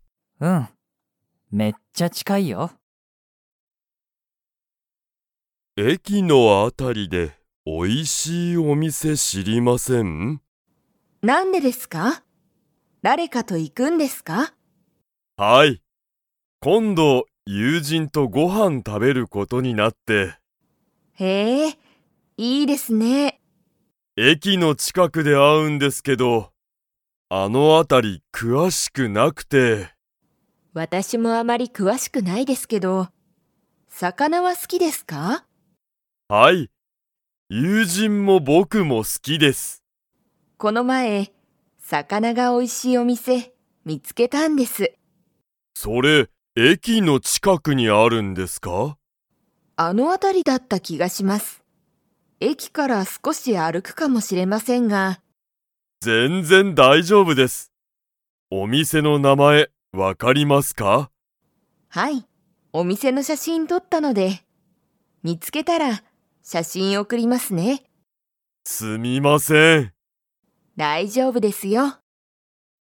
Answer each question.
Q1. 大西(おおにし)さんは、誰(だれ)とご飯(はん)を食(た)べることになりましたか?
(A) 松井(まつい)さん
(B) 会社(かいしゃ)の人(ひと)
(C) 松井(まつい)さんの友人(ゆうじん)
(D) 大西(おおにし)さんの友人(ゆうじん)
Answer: D

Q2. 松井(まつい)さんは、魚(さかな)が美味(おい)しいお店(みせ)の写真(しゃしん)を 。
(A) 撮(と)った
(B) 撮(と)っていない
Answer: A

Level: Level 3

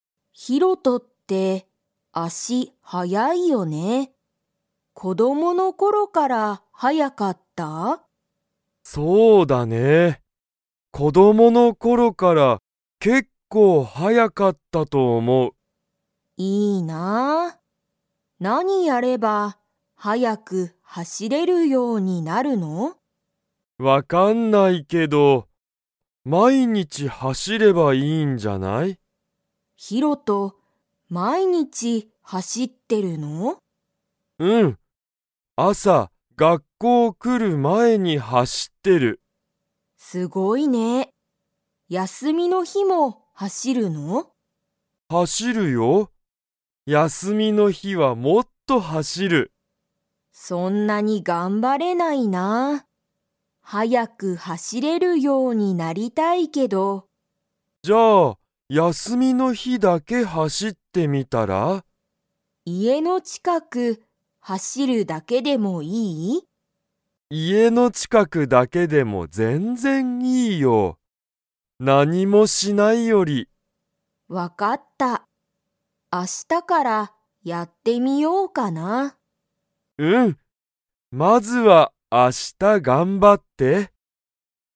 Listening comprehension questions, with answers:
Comprehension Quiz (Skip if you don't understand the conversation yet)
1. ヒロトは、____走はしってる。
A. 子供こどもの頃ころだけ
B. 毎日まいにち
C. 休やすみの日ひだけ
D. 明日あした近ちかくを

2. ユウコは、速はやく走はしれるようになりたいですか?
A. はい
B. いいえ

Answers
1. B
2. A

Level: Level 2

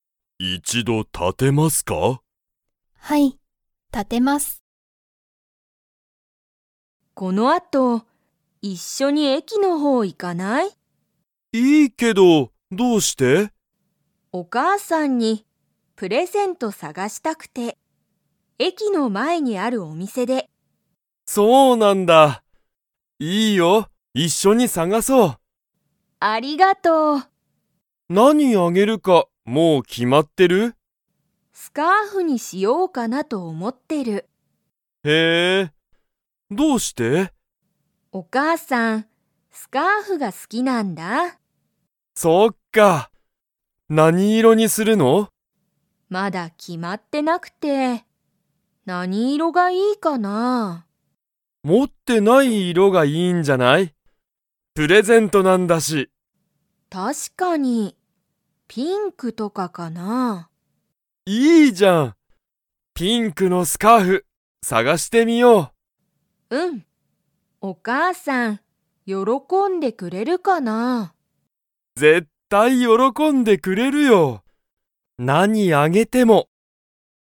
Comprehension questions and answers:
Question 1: ユウコは の前まえのお店みせに行いきたい。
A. 学校がっこう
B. 自分じぶんの家いえ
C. 駅えき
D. 病院びょういん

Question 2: お母かあさんはピンクのスカーフを持もっていますか?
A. はい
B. いいえ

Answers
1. C
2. B

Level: Level 3

